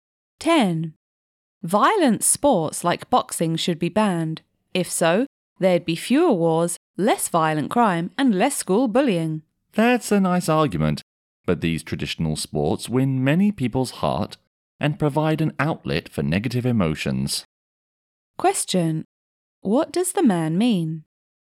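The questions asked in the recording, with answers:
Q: What does the man mean?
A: Violent sports like boxing should not be banned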